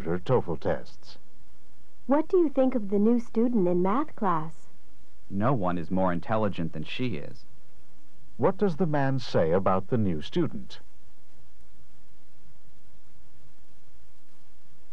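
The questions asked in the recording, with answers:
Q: What does the man say about the new student?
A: She is the most intelligent.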